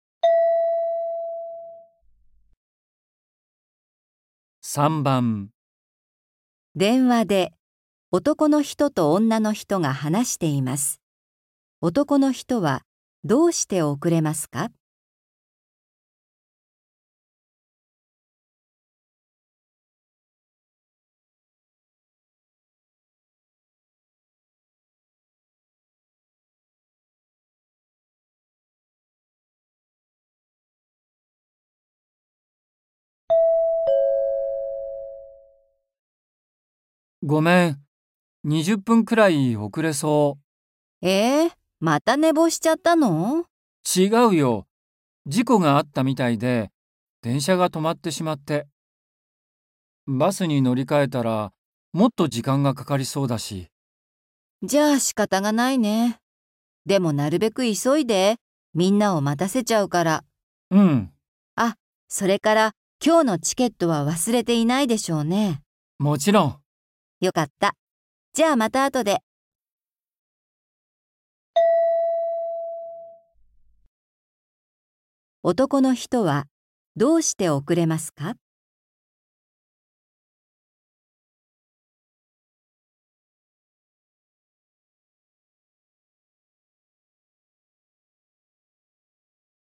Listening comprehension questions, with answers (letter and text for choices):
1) 男の人はどうして遅れますか。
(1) 電車が止まったから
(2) バスが来ないから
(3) 机ばりしたから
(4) 忘れ物をしたから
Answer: (1) 電車が止まったから

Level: 初級